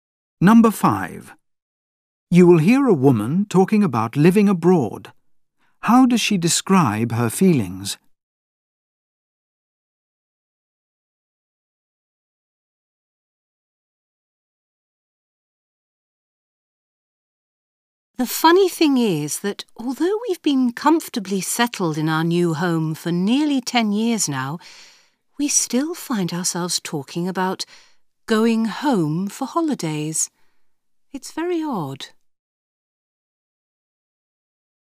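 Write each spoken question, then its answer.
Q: How does she describe her feelings?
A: She still thinks of her old country as home, which she finds odd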